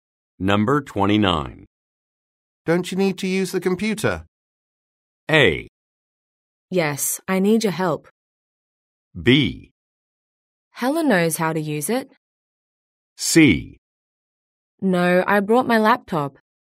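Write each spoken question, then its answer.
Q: Don't you need to use the computer?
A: C: No, I brought my laptop.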